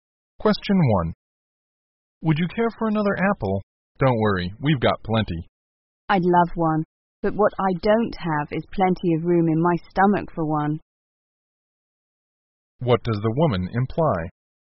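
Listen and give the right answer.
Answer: She is too full to eat another apple.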